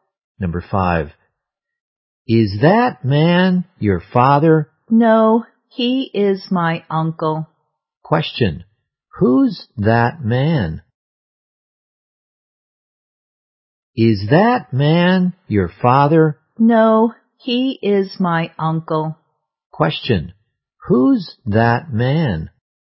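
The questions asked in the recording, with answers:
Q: who's that man?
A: The speaker's uncle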